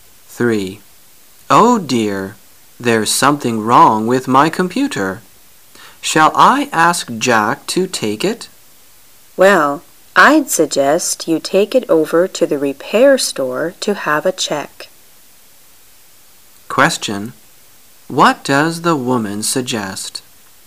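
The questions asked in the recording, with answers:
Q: Question: What does the woman suggest?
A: Take the computer to the repair store for a check

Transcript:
[解析] M: Oh dear, there's something wrong with my computer, shall I ask Jack to take it? W: Well, I'd suggest you take it over to the repair store to have a check. Q: What does the woman suggest?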